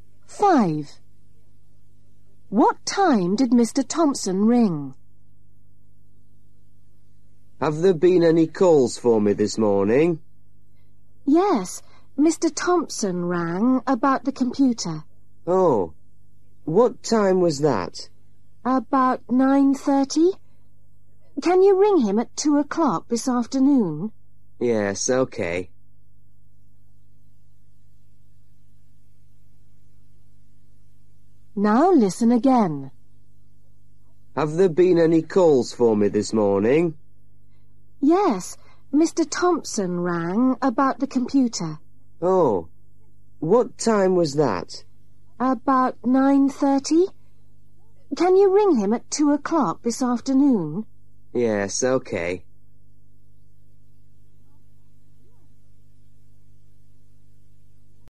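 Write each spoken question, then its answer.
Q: What time did Mr. Thompson ring?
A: about 9:30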